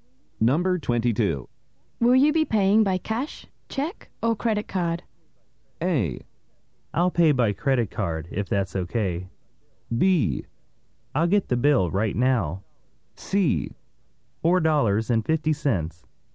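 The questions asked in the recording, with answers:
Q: Will you be paying by cash, check, or credit card?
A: A: I'll pay by credit card, if that's okay.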